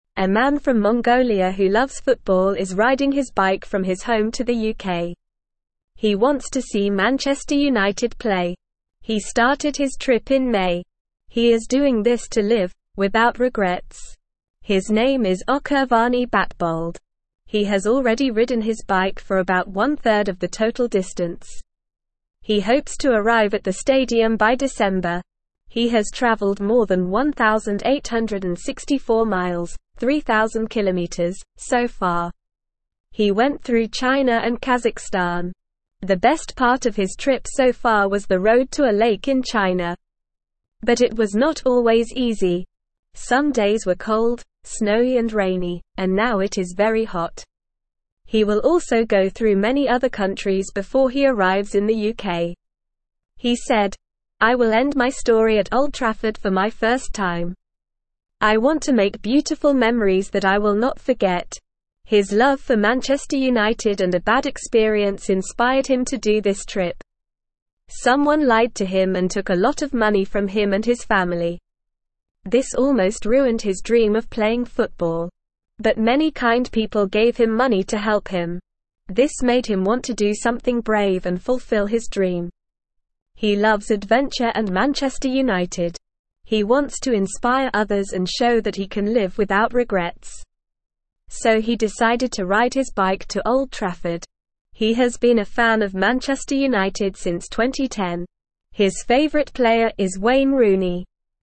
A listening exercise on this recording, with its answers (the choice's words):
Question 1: Where is the man from?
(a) China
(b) Mongolia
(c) UK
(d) Kazakhstan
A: Mongolia

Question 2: Where is the man riding his bike to?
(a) China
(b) Kazakhstan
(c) Mongolia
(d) UK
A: UK

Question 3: When did the man start his trip?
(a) December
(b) January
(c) July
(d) May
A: May

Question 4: How much of the total distance has the man ridden his bike?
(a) Half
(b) Two thirds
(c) One third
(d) All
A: One third

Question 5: What was the best part of his trip so far?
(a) The road to a lake in Kazakhstan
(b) The road to a lake in Mongolia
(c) The road to a lake in UK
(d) The road to a lake in China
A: The road to a lake in China

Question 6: Why is the man doing this trip?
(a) He was inspired by a bad experience and his love for Manchester United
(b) He was inspired by a good experience and his love for Manchester United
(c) He was inspired by a bad experience and his dislike for Manchester United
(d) He was inspired by a good experience and his dislike for Manchester United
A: He was inspired by a bad experience and his love for Manchester United

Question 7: What is the man's dream?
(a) To play football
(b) To ride his bike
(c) To watch football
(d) To travel the world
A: To play football

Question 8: Who is the man's favorite player?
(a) David Beckham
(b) Cristiano Ronaldo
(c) Lionel Messi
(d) Wayne Rooney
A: Wayne Rooney

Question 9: A man from (1)______ who loves football is riding his bike from his home to the UK.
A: Mongolia

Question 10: He has already ridden his bike for about one third of the total (2)______.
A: distance

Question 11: Some days were cold, snowy and rainy, and now it is very (3)______.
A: hot

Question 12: I want to make beautiful memories that I will not (4)______.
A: forget

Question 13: This made him want to do something brave and fulfill his (5)______.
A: dream

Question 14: His favorite player is (6)______.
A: Wayne Rooney

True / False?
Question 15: The man is riding his bike from Mongolia to the UK.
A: True

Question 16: The man's name is Ochirvaani Batbold.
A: True

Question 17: He started his trip in June.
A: False

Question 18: He has already ridden his bike for half of the total distance.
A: False

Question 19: He went through China and Kazakhstan.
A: True

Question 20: His favorite player is Lionel Messi.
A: False

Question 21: He wants to end his story at Old Trafford for his second time.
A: False

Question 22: Where is the man from who is riding his bike to the UK?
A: The man is from Mongolia.

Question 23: Why is the man riding his bike to the UK?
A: The man is riding his bike to the UK to see Manchester United play.

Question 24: When did the man start his bike trip?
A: The man started his bike trip in May.

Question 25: How far has the man already ridden his bike?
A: The man has already ridden his bike for about one third of the total distance.

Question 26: What were some of the hard parts of his trip so far?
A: Some hard parts of his trip were cold, snowy and rainy days.

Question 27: What does the man want to do at Old Trafford?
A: The man wants to make beautiful memories at Old Trafford.

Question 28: Who is the man's favorite football player?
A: The man's favorite football player is Wayne Rooney.

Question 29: Why did the man decide to ride his bike to Old Trafford?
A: The man decided to ride his bike to Old Trafford to live without regrets and fulfill his dream.

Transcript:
A man from Mongolia who loves football is riding his bike from his home to the UK. He wants to see Manchester United play. He started his trip in May. He is doing this to live "without regrets". His name is Ochirvaani Batbold. He has already ridden his bike for about one third of the total distance. He hopes to arrive at the stadium by December.
He has travelled more than 1,864 miles (3,000km) so far. The best part of his trip so far was the road to a lake in China. But it was not always easy. Some days were cold, snowy and rainy, and now it is very hot.
He will also go through many other countries before he arrives in the UK. He said, "I will end my story at Old Trafford for my first time. I want to make beautiful memories that I will not forget."
His love for Manchester United and a bad experience inspired him to do this trip. Someone lied to him and took a lot of money from him and his family. This almost ruined his dream of playing football. But many kind people gave him money to help him. This made him want to do something brave and fulfill his dream.
He loves adventure and Manchester United. He wants to inspire others and show that he can live without regrets. So he decided to ride his bike to Old Trafford. He has been a fan of Manchester United since 2010. His favorite player is Wayne Rooney.

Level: Level 1